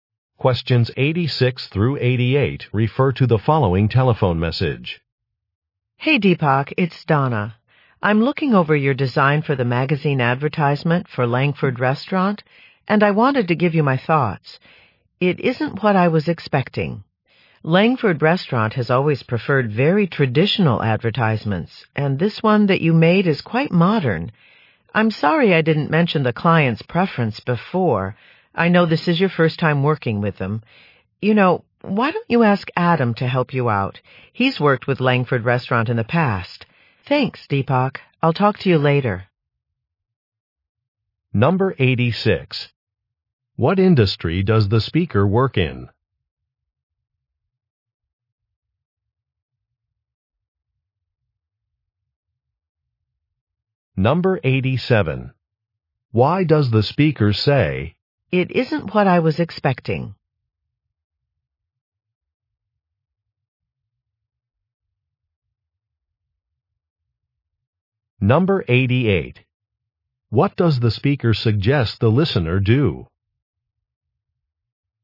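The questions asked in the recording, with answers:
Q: What industry does the speaker work in?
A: Advertising

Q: What does the speaker suggest the listener do?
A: Ask Adam for help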